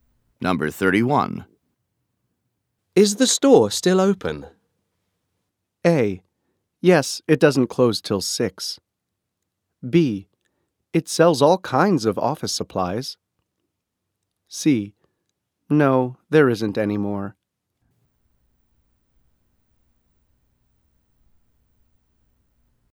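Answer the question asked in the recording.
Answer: A: Yes, it doesn't close till 6.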